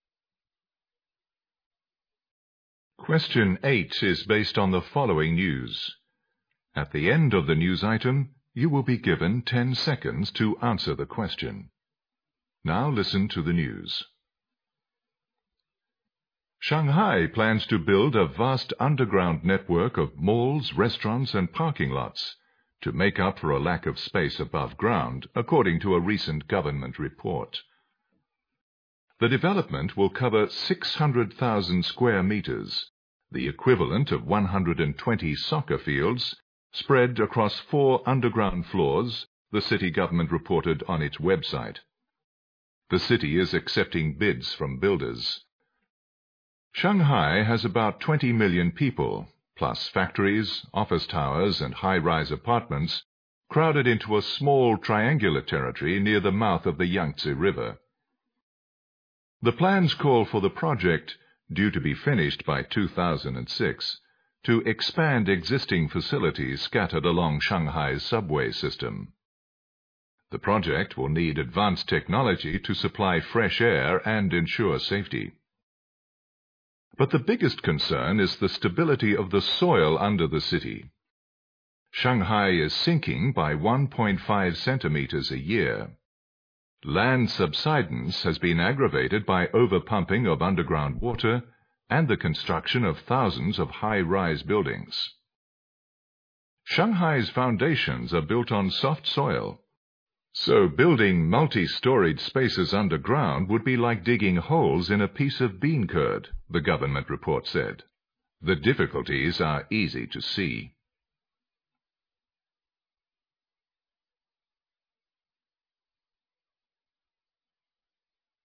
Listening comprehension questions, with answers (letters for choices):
Question 8 is based on thefollowing news. At the end of the news item, you will be given 10 seconds toanswer the question.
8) The news is mainly about the city government's plan to _____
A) expand and improve theexisting subway system.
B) build underground malls andparking lots.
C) prevent further landsubsidence.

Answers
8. B

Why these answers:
主旨题。材料一开始就指出"Shanghai plans to build a vast underground networkof halls, restaurants and parking lots",然后介绍建设原因和建设准备。

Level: GRADE EIGHT